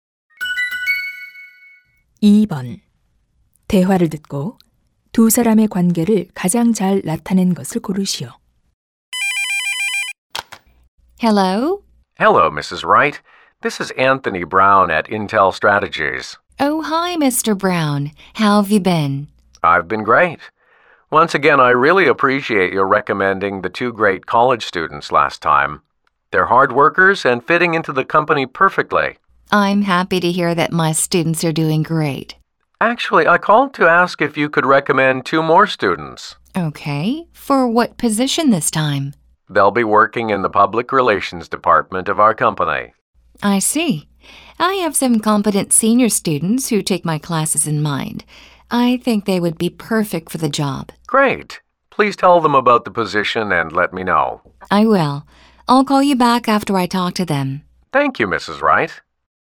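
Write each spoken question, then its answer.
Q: 대화를 듣고 두 사람의 관계를 가장 잘 나타낸 것을 고르시오.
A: 대학 교수 - 회사 직원(인사 담당자)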